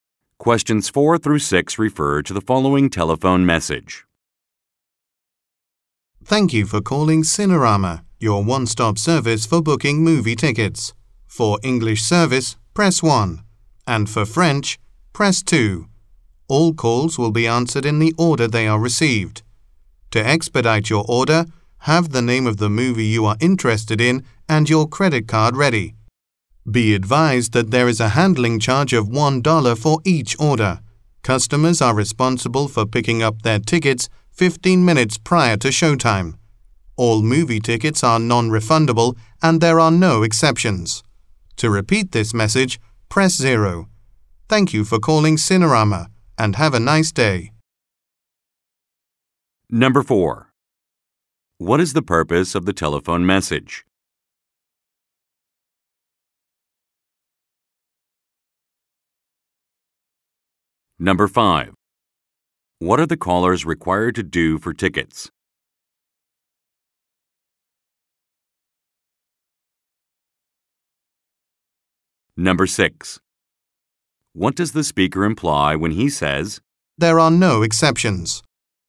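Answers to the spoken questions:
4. To explain how to book movie tickets by phone
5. Pick them up 15 minutes before showtime
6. No tickets can be refunded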